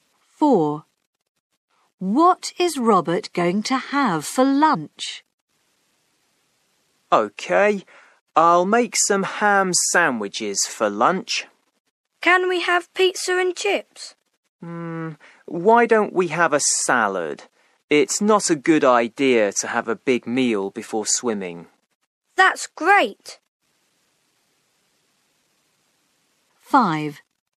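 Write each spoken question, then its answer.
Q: What is Robert going to have for lunch?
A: A salad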